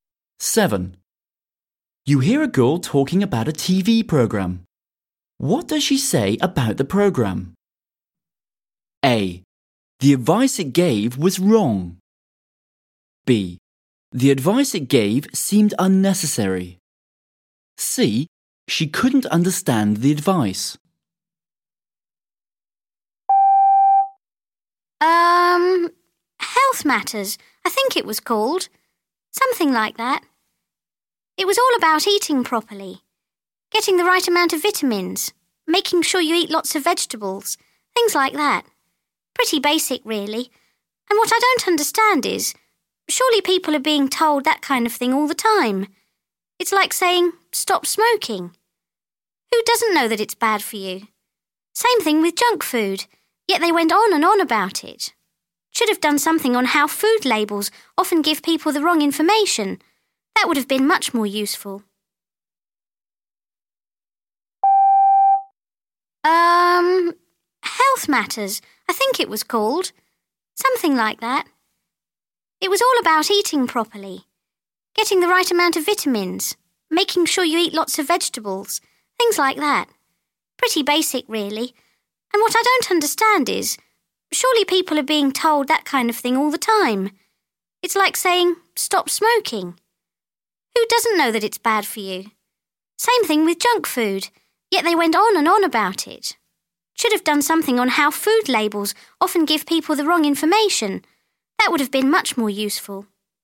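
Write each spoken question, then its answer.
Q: What does she say about the programme?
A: B: The advice it gave seemed unnecessary.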